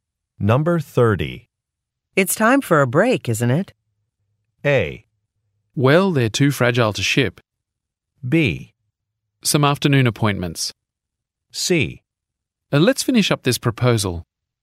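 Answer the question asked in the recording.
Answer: C: Let's finish up this proposal.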